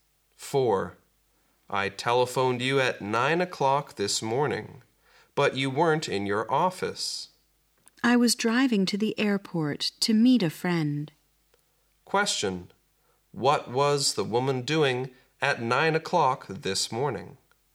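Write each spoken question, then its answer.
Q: What was the woman doing at 9 o'clock this morning?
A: Driving to the airport to meet a friend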